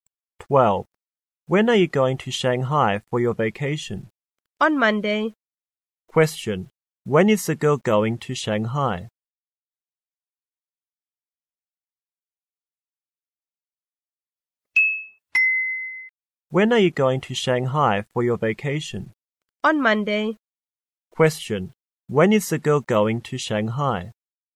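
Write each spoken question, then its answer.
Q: When is the girl going to Shanghai?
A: On Monday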